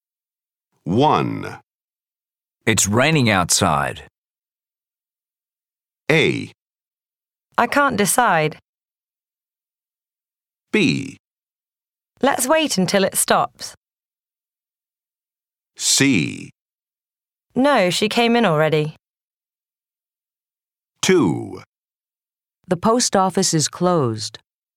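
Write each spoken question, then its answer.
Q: It's raining outside.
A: B: Let's wait until it stops.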